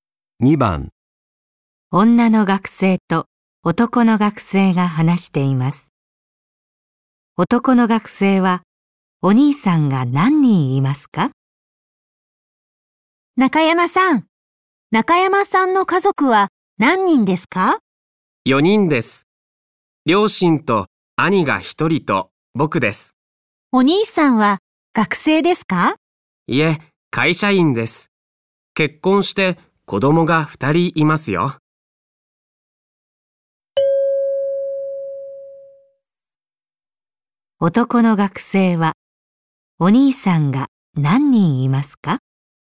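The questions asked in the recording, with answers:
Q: 男の学生は、お兄さんが何人いますか?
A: 1人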